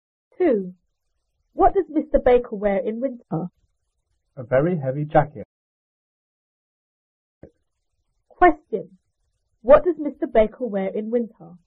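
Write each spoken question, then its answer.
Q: What does Mr. Baker wear in winter?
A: A very heavy jacket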